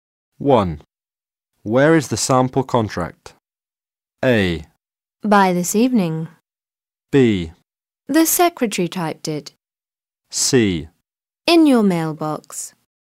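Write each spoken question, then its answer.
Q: Where is the sample contract?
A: C: In your mailbox.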